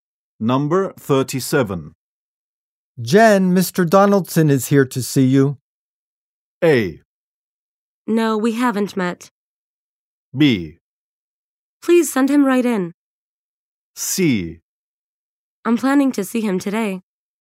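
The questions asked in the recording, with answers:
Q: Jen, Mr. Donaldson is here to see you.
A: B: Please send him right in.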